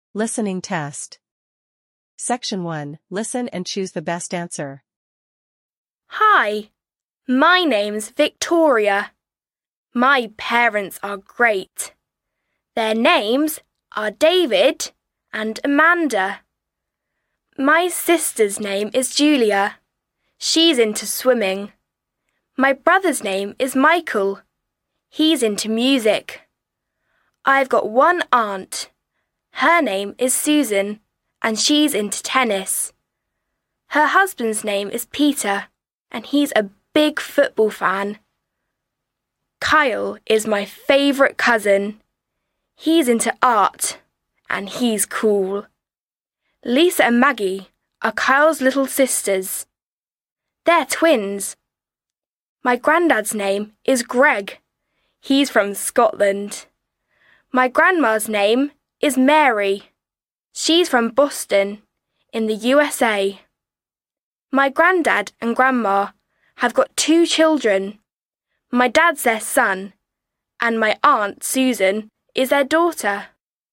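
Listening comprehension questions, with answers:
Listen and choose the best answer A, B, or C.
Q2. What does Michael like?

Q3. Who is Victoria's favorite cousin?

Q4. Where is Victoria's grandma from?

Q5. How many children do Victoria's grandparents have?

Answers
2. Music
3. Kyle
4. Boston in the USA
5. Two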